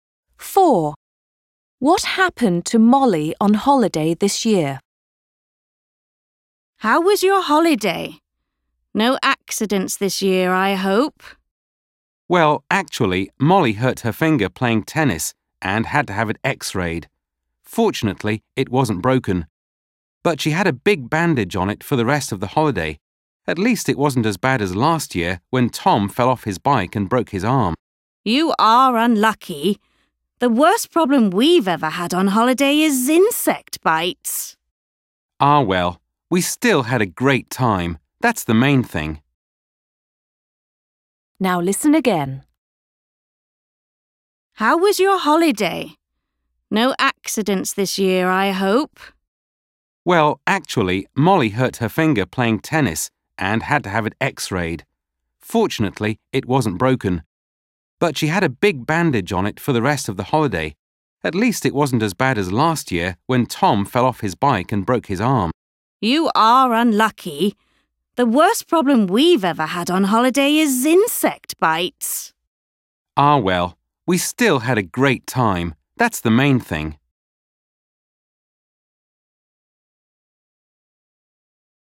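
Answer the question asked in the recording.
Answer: She hurt her finger playing tennis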